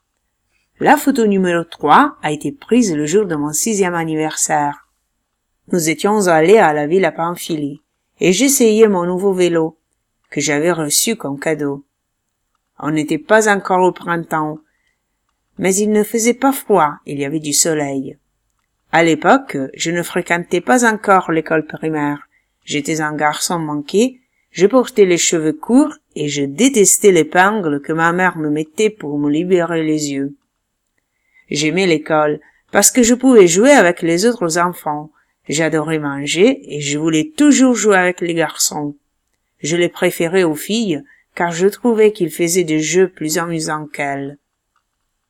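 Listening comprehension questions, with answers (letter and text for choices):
Clique sur les photos, écoute et réponds aux questions.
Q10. On était au printemps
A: FAUX

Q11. Je fréquentais encore l'école maternelle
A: VRAI

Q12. Le vélo était tout neuf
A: VRAI

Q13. Je n'aimais pas les jeux des filles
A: VRAI

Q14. Ma mère ne voulait pas que je porte les cheveux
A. COURTS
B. SUR LES YEUX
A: B. SUR LES YEUX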